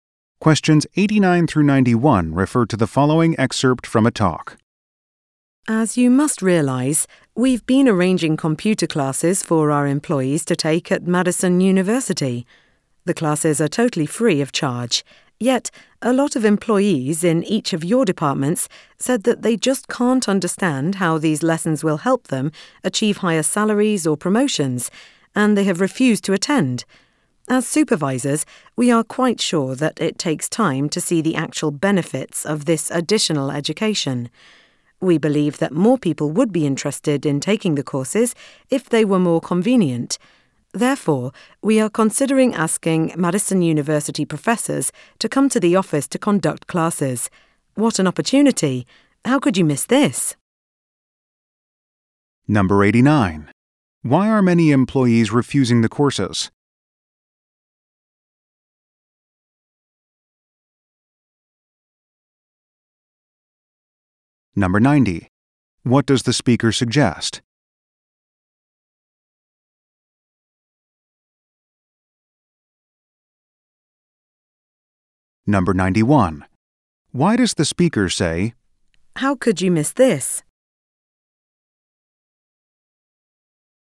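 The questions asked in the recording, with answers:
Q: Why are many employees refusing the courses?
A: They don't see how the courses help them get higher salaries or promotions

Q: What does the speaker suggest?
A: Having professors teach the classes at the office

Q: Why does the speaker say,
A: To encourage employees to attend the classes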